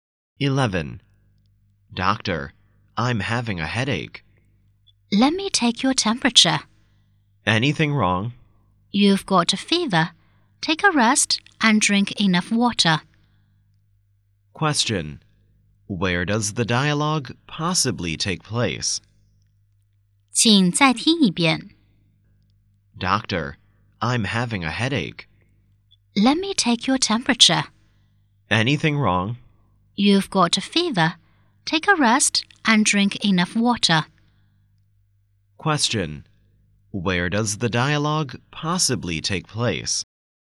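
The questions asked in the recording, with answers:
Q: Where does the dialogue possibly take place?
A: In a hospital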